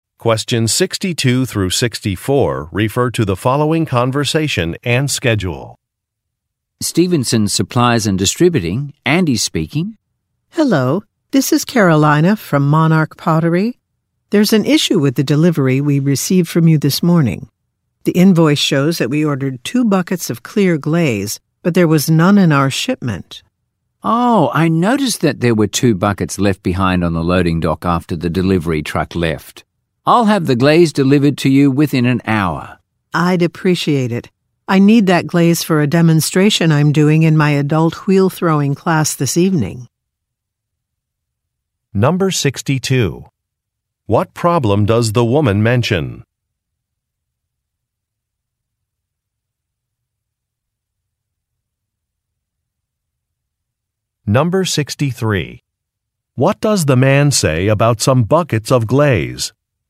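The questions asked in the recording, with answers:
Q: What problem does the woman mention?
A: Her delivery was missing the 2 buckets of clear glaze she ordered.

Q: What does the man say about some buckets of glaze?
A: They were left behind on the loading dock after the delivery truck left.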